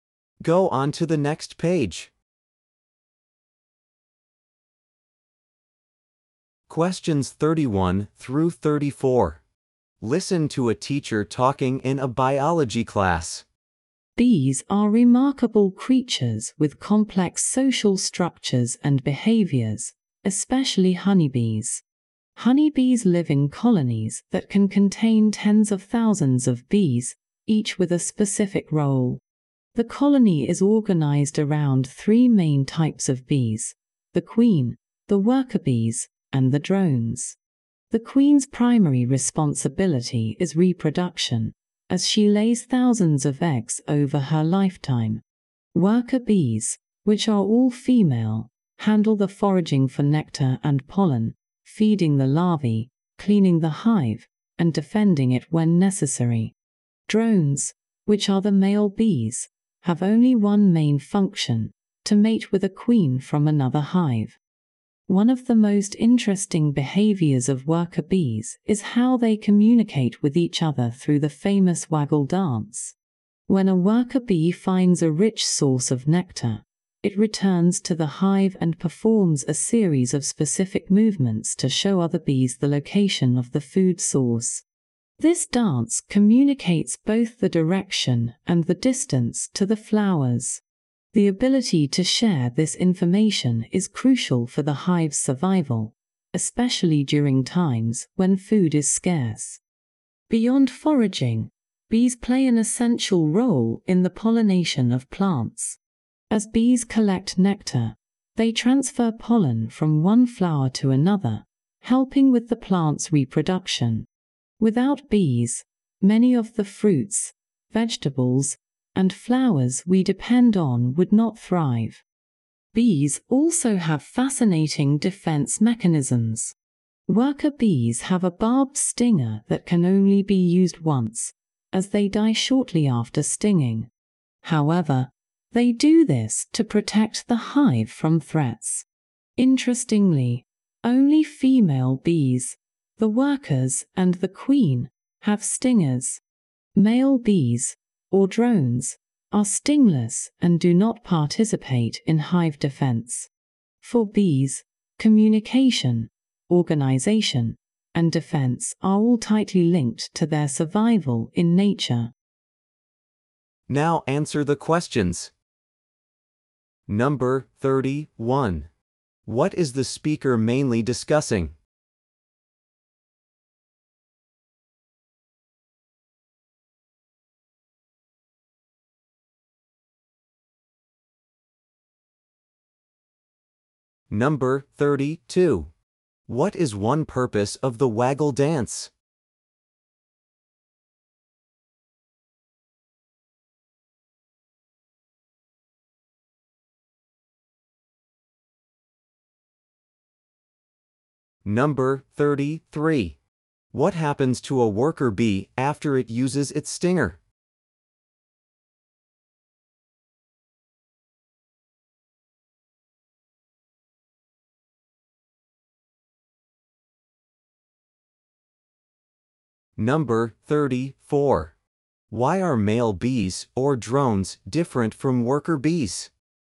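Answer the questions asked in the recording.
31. The social structure and behavior of honeybees
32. To show other bees where food is
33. It dies shortly after
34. They have no stingers and do not defend the hive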